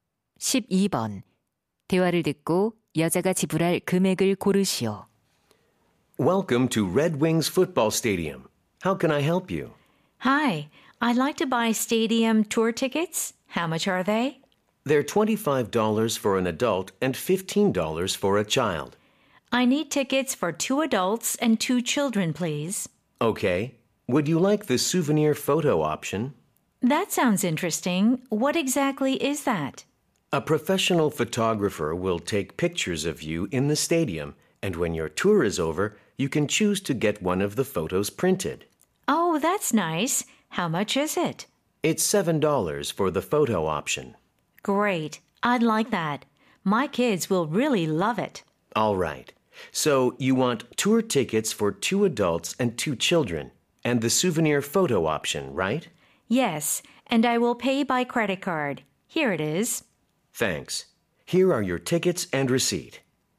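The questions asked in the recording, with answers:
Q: 대화를 듣고 여자가 지불할 금액을 고르시오.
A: $87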